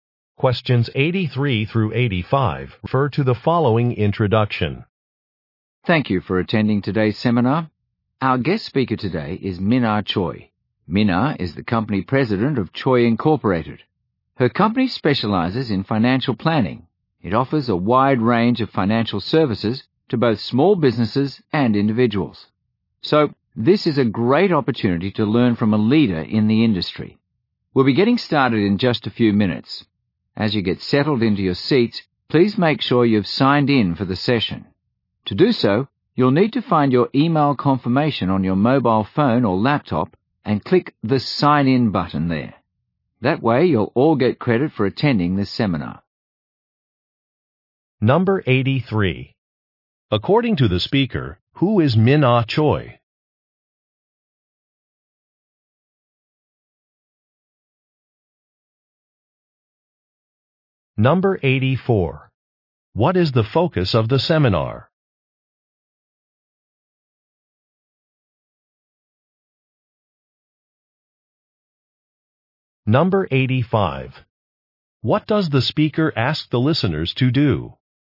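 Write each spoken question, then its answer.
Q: According to the speaker, who is Minar Choi?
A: A company president

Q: What is the focus of the seminar?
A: Financial planning

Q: What does the speaker ask the listeners to do?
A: Sign in for the session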